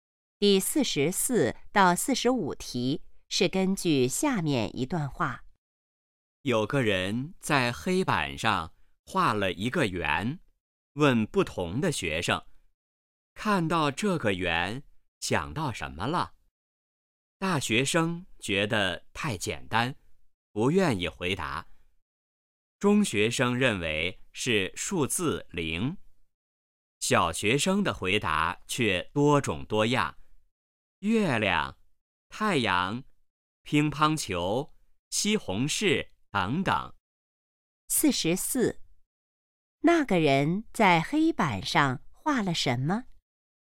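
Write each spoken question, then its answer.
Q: 那个人在黑板上画了什么?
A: 一个圆

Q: 大学生觉得这个问题怎么样?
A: 太简单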